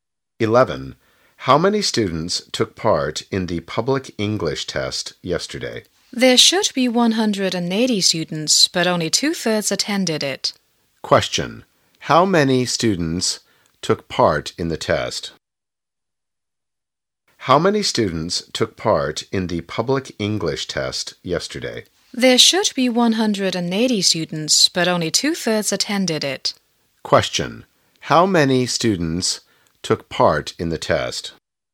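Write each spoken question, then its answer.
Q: How many students took part in the test?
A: 120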